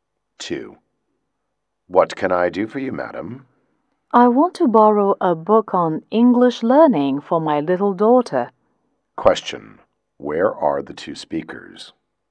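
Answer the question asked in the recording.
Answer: In a library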